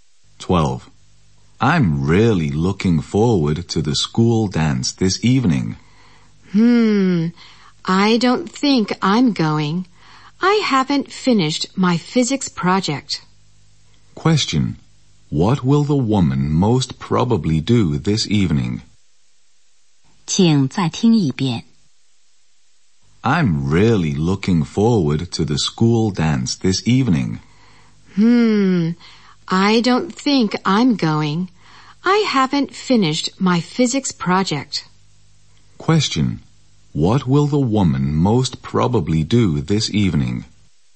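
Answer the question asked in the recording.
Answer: Work on her physics project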